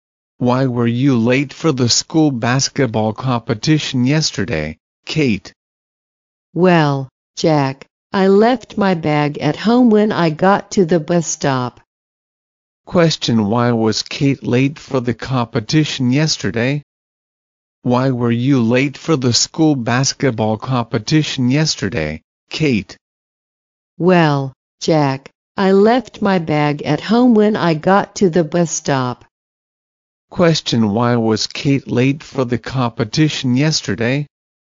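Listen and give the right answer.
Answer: She left her bag at home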